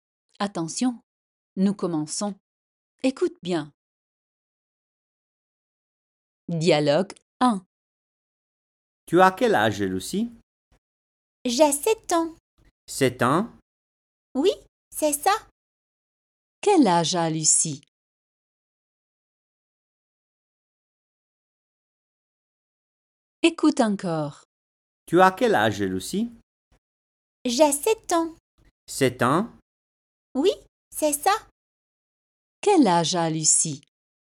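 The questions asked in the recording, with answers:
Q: Quel âge a Lucie?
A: 7 ans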